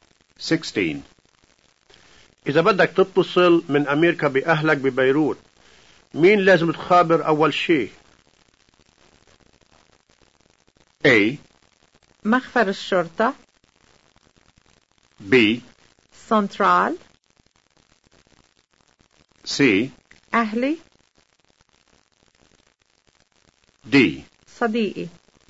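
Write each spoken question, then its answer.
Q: إذا بدك تتصل من أمريكا بأهلك ببيروت، مين لازم تخابر أول شيء؟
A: B: سنترال.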